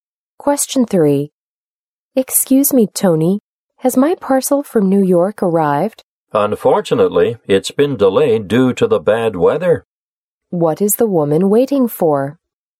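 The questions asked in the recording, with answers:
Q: What is the woman waiting for?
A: A parcel from New York.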